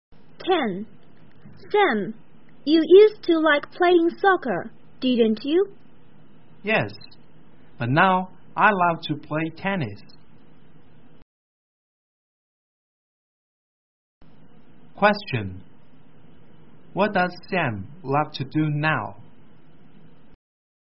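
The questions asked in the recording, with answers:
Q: What does Sam love to do now?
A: Play tennis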